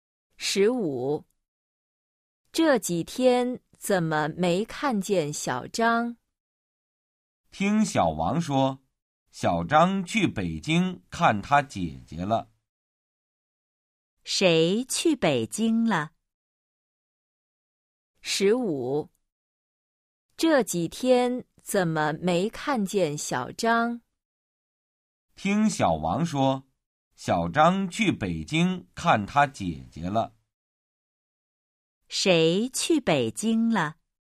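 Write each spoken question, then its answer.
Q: 谁去北京了?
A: 小张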